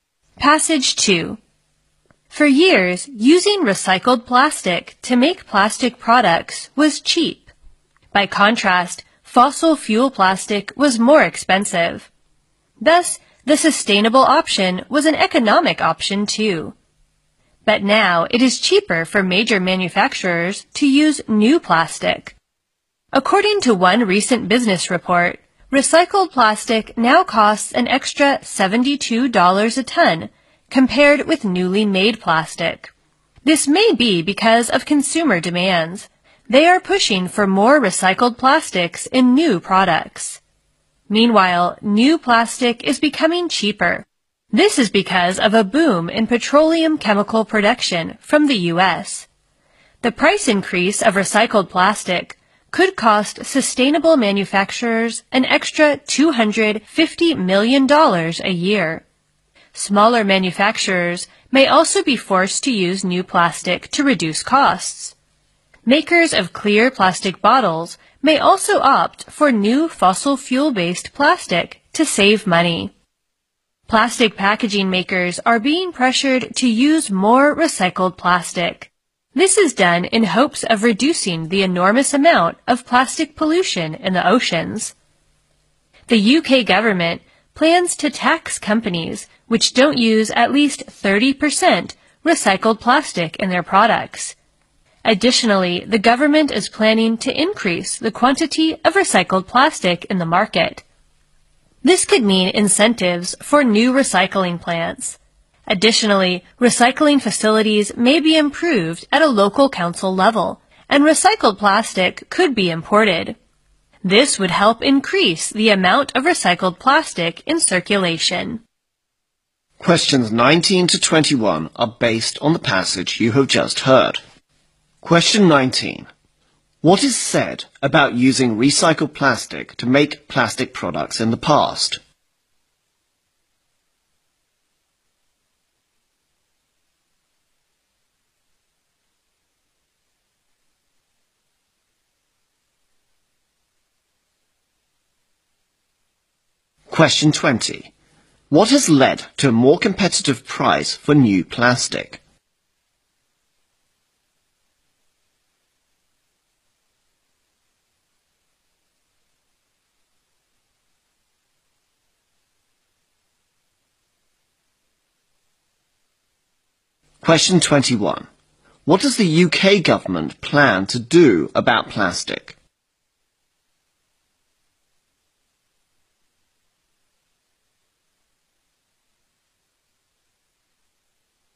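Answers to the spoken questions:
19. It was cheap, both sustainable and economic.
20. A boom in petroleum chemical production in the U.S.
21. Tax companies that don't use at least 30% recycled plastic.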